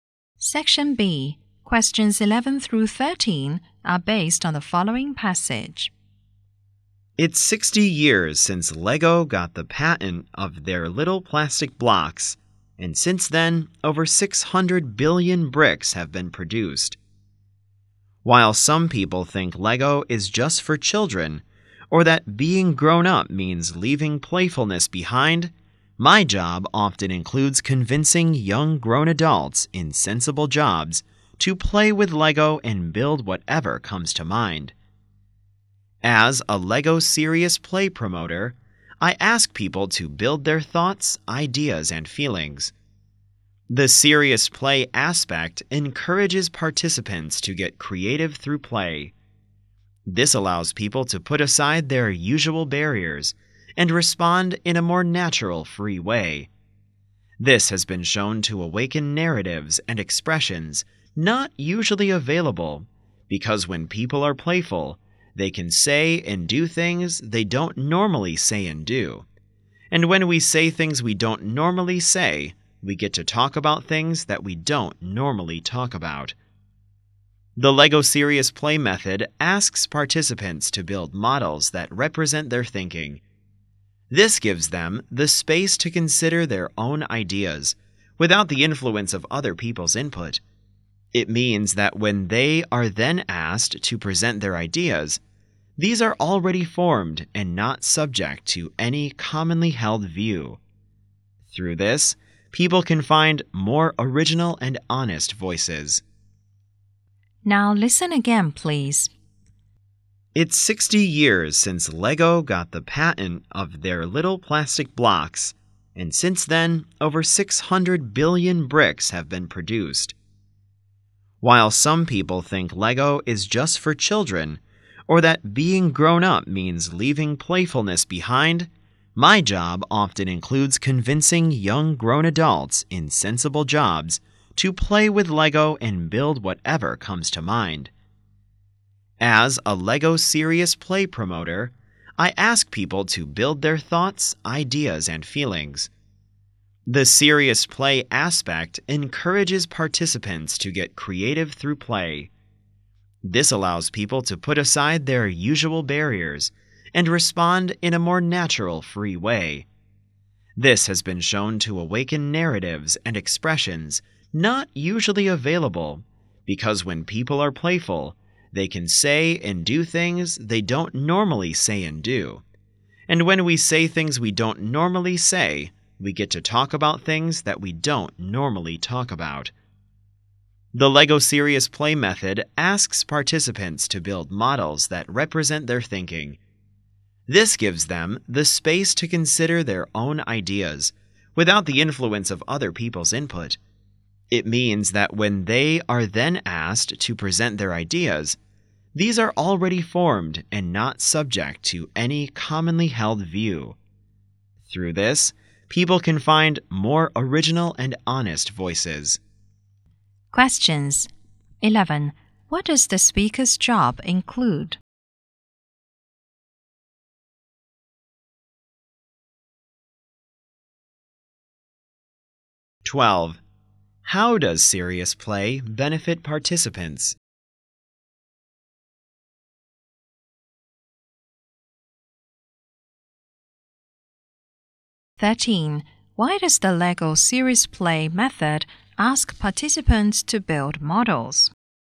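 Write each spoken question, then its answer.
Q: What does the speaker's job include?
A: Convincing adults to play with Lego and build whatever comes to mind

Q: How does Serious Play benefit participants?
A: It lets them put aside usual barriers and respond more naturally and freely

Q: Why does the LEGO Serious Play method ask participants to build models?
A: To let them form their own ideas without others' influence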